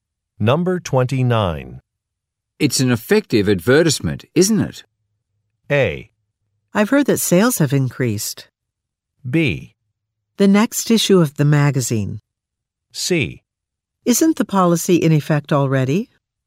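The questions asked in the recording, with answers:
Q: It's an effective advertisement, isn't it?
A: A: I've heard that sales have increased.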